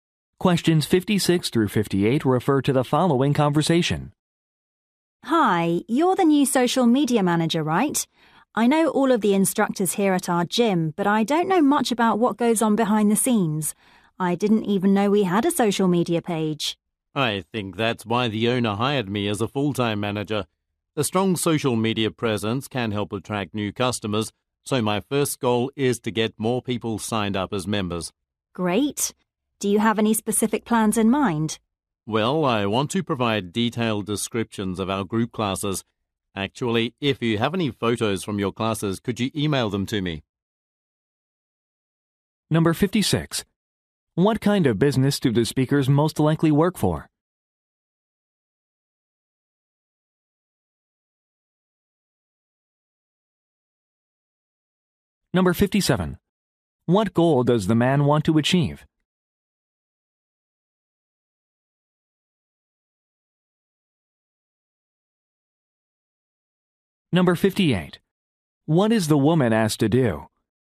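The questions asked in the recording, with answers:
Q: What kind of business do the speakers most likely work for?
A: A gym

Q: What goal does the man want to achieve?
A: To get more people to sign up as members

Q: What is the woman asked to do?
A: Email photos from her classes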